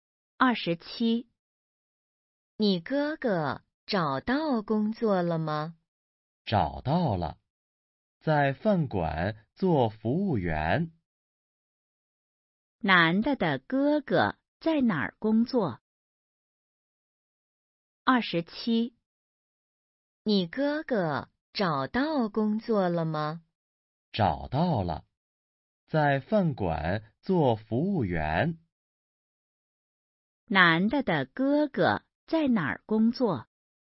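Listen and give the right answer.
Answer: 饭馆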